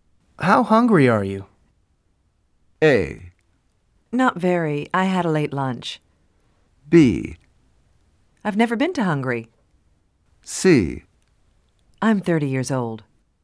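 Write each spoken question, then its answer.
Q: How hungry are you?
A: A: Not very. I had a late lunch.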